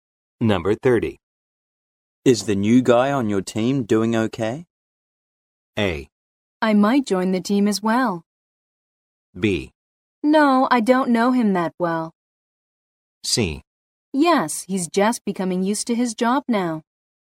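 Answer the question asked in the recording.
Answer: C: Yes, he's just becoming used to his job now.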